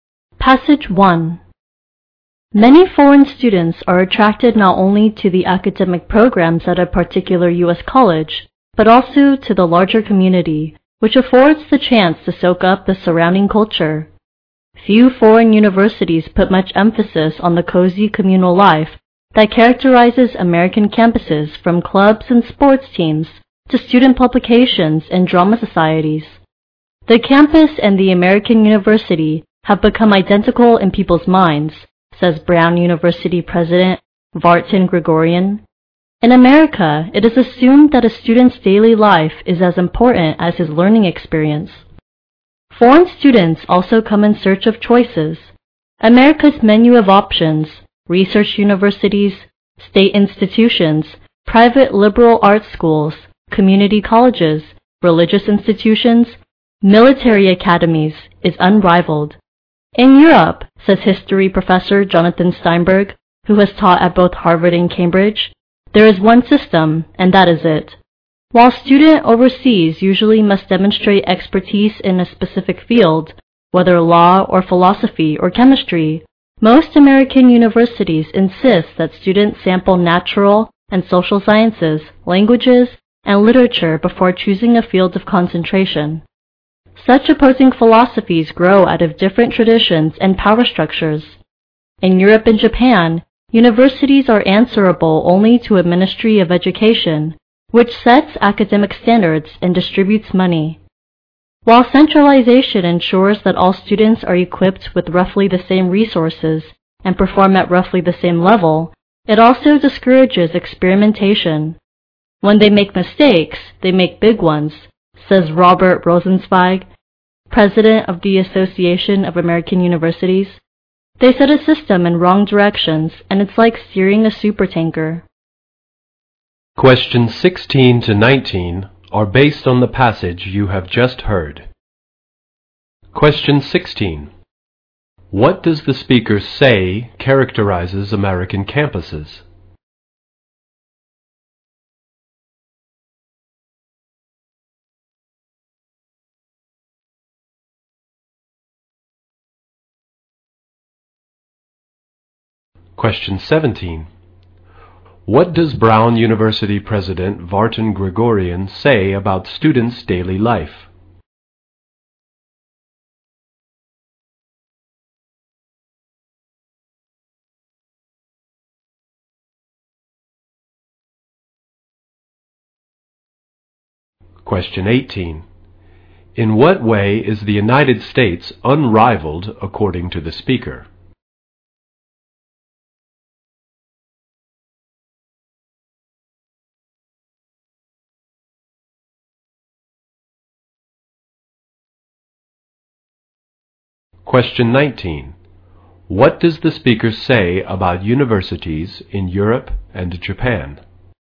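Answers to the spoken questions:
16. Cozy communal life.
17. It is as important as their learning experience.
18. Its range of choices in types of institutions.
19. They answer only to a Ministry of Education, which discourages experimentation.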